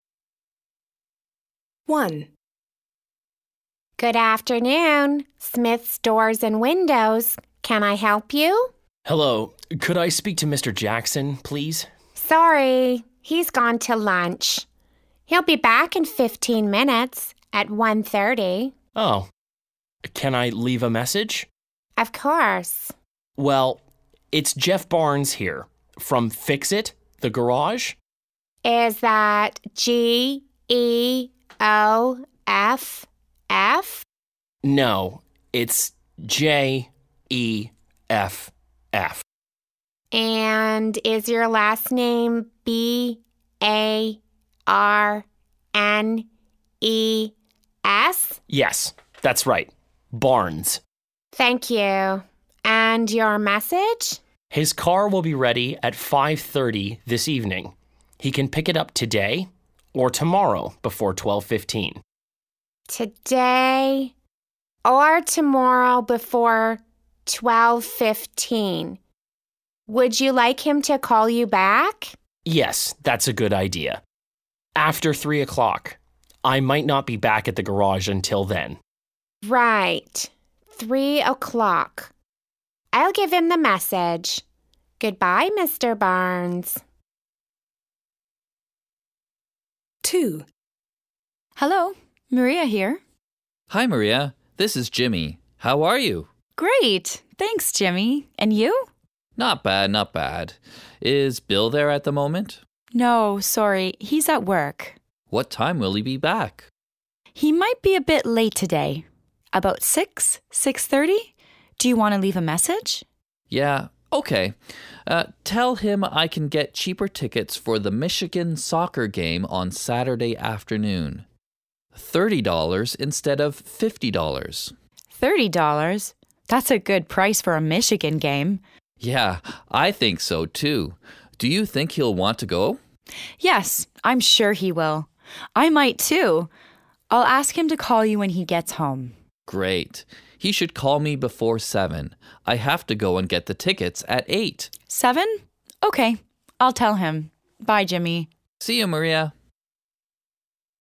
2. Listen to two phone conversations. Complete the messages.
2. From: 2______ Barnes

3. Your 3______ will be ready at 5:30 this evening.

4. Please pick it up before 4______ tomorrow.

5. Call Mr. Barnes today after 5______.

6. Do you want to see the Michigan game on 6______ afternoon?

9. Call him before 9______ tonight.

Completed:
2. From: Jeff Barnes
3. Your car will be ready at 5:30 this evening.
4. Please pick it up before 12:15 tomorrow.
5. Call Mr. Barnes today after three o'clock.
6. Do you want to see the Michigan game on Saturday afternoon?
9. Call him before seven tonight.